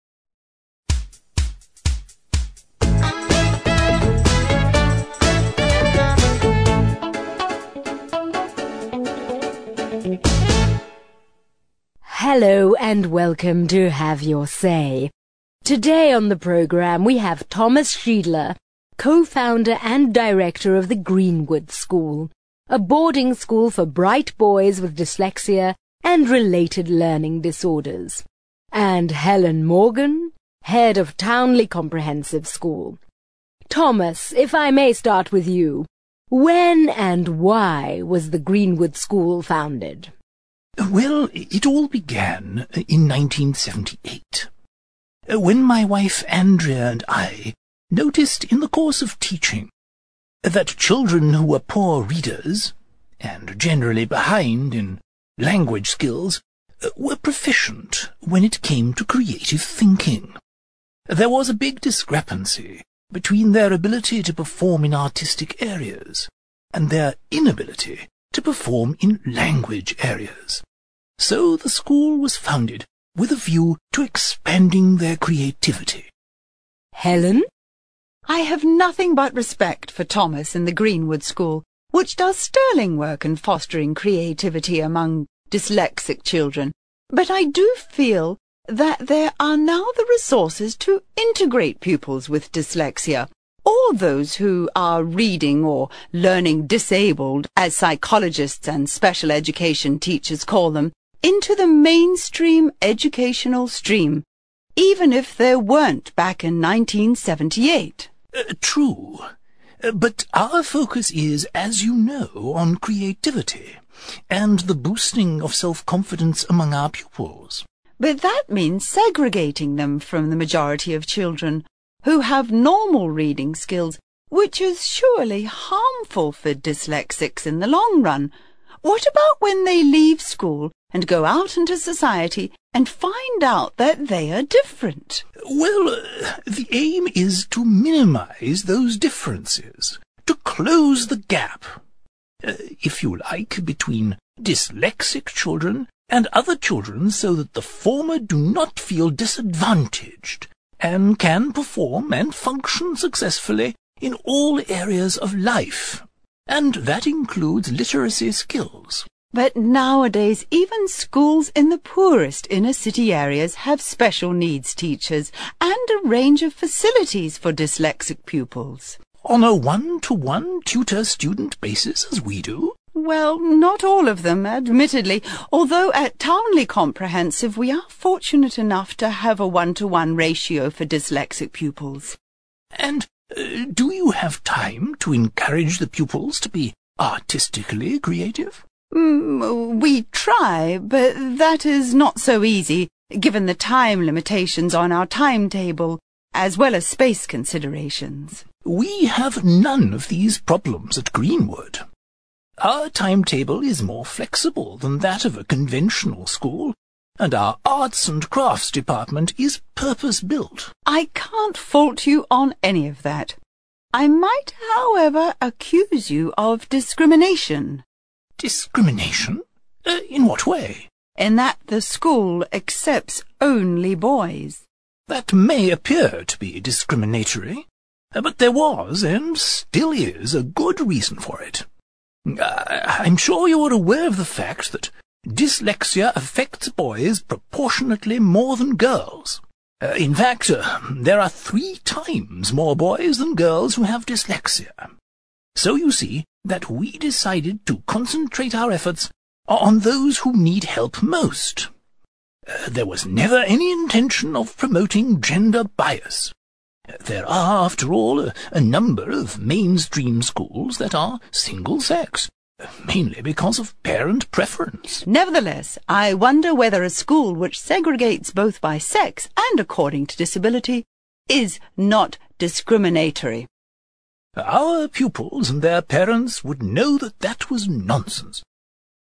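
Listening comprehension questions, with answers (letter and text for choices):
For questions 23-28 decide whether the opinions are expressed by only one of the speakers (choose THOMAS or HELEN), or whether both speakers agree (choose BOTH).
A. THOMAS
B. HELEN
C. BOTH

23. The aim of Greenwood school is to develop the creative abilities of students.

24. In the 70s, the education system wasn't able to cope with pupils with learning disabilities.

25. Separating dyslexic students from others may ultimately have negative effects.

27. Dyslexic students benefit from smaller classes.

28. Dyslexia tends to affect one gender more than the other.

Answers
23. A. THOMAS
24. C. BOTH
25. B. HELEN
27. C. BOTH
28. A. THOMAS

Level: CPE Proficiency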